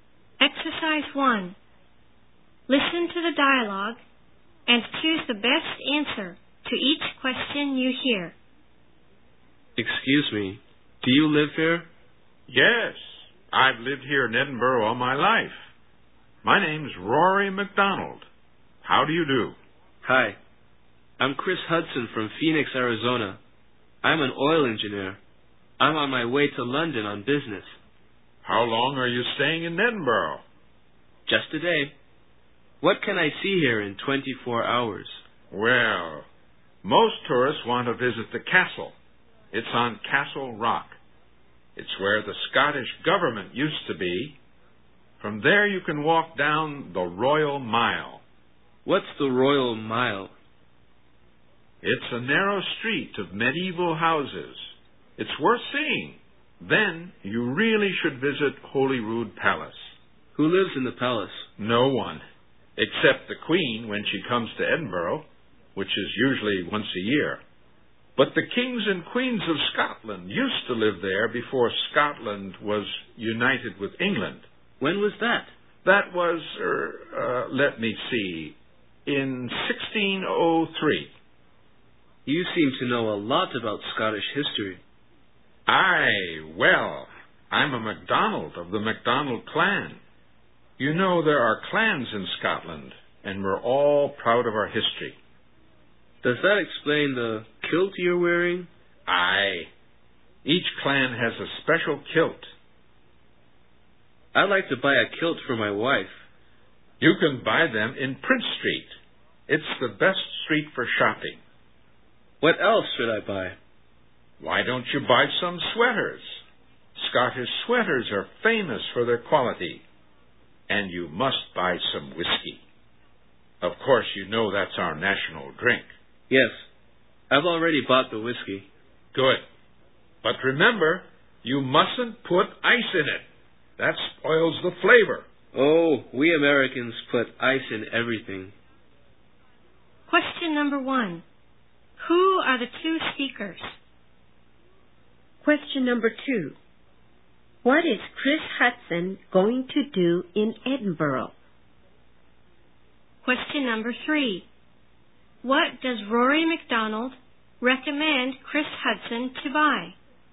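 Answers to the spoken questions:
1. A local Edinburgh man (Rory MacDonald) and an American oil engineer visiting Edinburgh (Chris Hudson)
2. Spend a day sightseeing on his way to London on business
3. A kilt, Scottish sweaters and whiskey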